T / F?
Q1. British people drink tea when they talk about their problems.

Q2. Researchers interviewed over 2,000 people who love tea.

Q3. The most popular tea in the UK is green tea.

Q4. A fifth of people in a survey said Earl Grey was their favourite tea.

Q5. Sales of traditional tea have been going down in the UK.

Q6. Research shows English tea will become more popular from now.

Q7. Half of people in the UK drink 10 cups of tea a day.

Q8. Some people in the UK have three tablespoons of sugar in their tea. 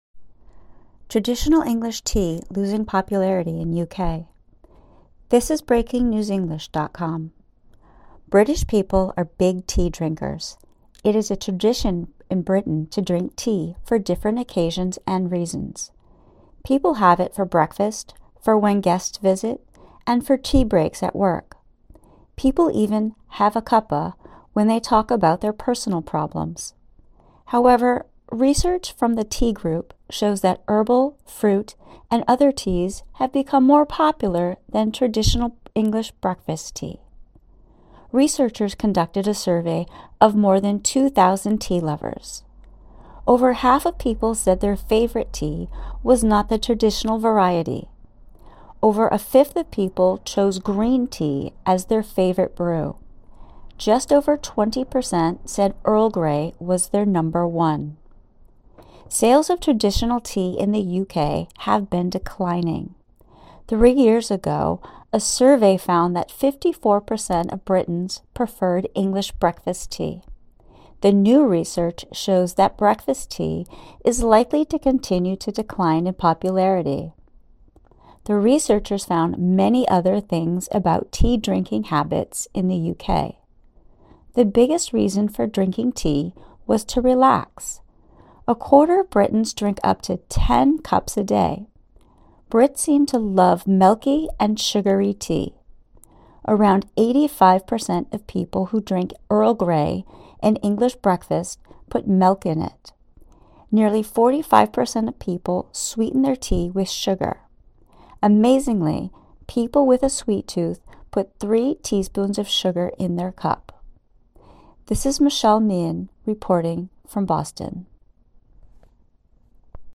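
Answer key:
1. T
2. T
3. F
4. T
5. T
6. F
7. F
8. F

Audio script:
(1/29) Traditional English tea losing popularity in UK
British people are big tea drinkers. It is a tradition in Britain to drink tea for different occasions and reasons. People have it for breakfast, for when guests visit, and for tea breaks at work. People even "have a cuppa" when they talk about their personal problems. However, research from The Tea Group shows that herbal, fruit and other teas have become more popular than traditional English breakfast tea. Researchers conducted a survey of more than 2,000 tea lovers. Over half of people said their favourite tea was not the traditional variety. Over a fifth of people chose green tea as their favourite brew. Just over 20 per cent said Earl Grey was their number one.
Sales of traditional tea in the U.K. have been declining. Three years ago, a survey found that 54 per cent of Britons preferred English breakfast tea. 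The new research shows that breakfast tea is likely to continue to decline in popularity. The researchers found many other things about tea-drinking habits in the U.K. The biggest reason for drinking tea was to relax. A quarter of Britons drink up to 10 cups a day. Brits seem to love milky and sugary tea. Around 85 per cent of people who drink Earl Grey and English breakfast put milk in it. Nearly 45 per cent of people sweeten their tea with sugar. Amazingly, people with a sweet tooth put three teaspoons of sugar in their cup.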